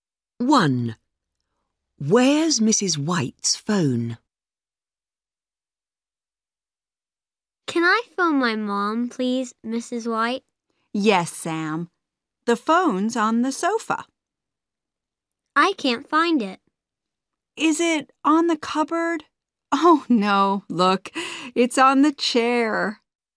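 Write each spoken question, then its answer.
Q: Where's Mrs. White's phone?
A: On the chair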